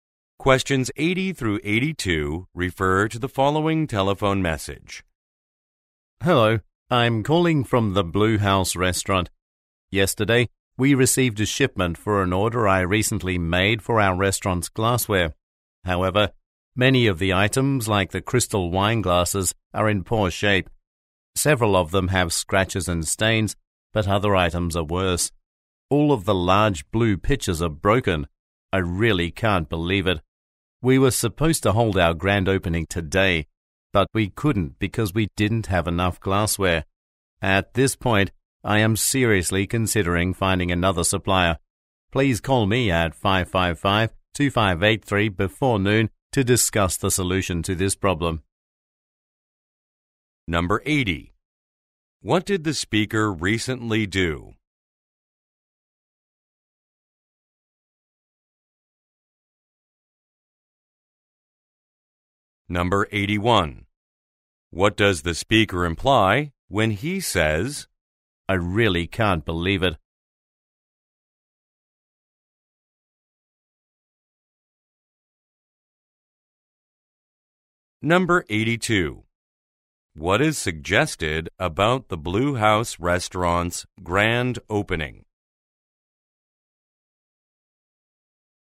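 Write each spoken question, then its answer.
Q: What did the speaker recently do?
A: He ordered glassware for his restaurant.

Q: What is suggested about the Blue House Restaurant's grand opening?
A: It had to be postponed because there was not enough glassware.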